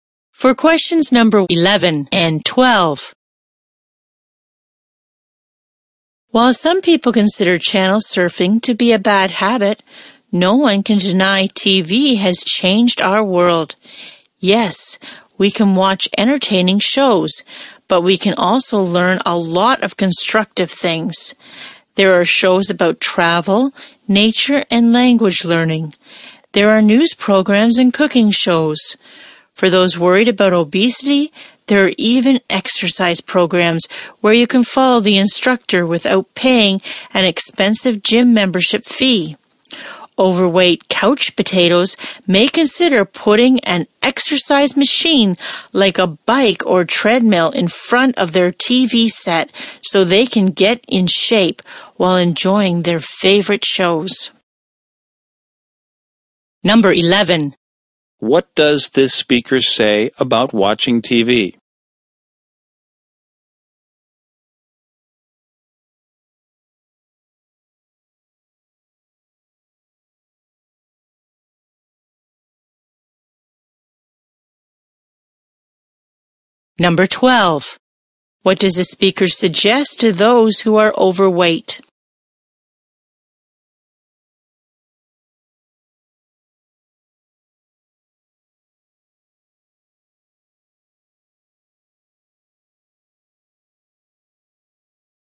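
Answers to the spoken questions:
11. You can learn a lot of useful things from it, not just be entertained.
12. Put an exercise machine in front of the TV.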